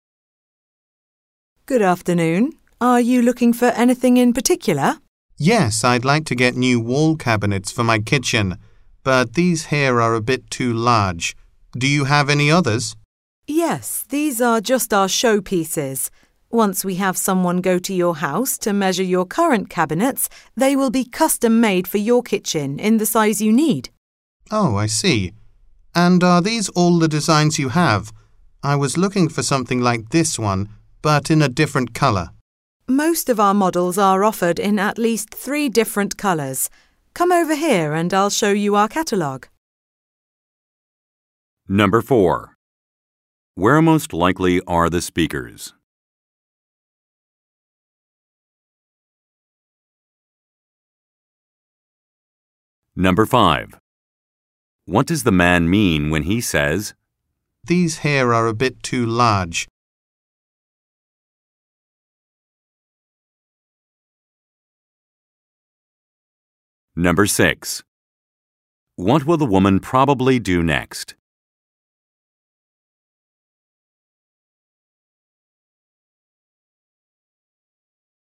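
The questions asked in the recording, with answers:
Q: Where most likely are the speakers?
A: In a kitchen cabinet showroom or store

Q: What does the man mean when he says,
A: The cabinets on display are too big for his kitchen; he needs smaller ones

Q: What will the woman probably do next?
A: Show the man a catalogue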